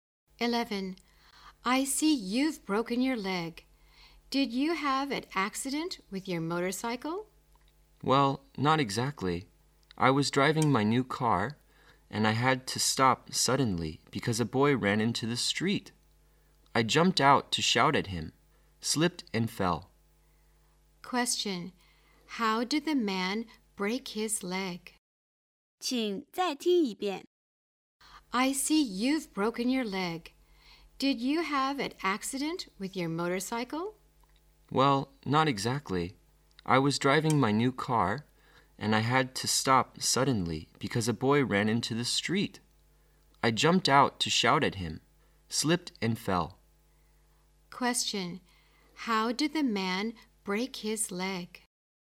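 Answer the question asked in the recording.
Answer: He slipped and fell when he jumped out of his car to shout at a boy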